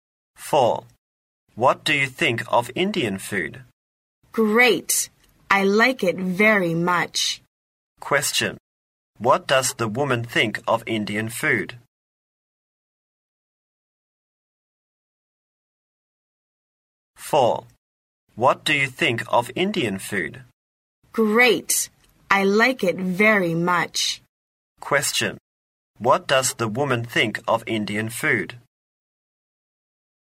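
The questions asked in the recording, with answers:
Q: Question. What does the woman think of Indian food?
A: It's great; she likes it very much.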